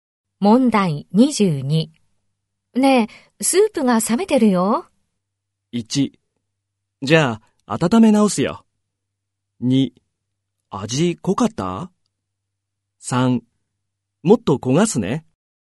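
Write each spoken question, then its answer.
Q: ねえ、スープが冷めてるよ。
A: 1: じゃあ、温め直すよ。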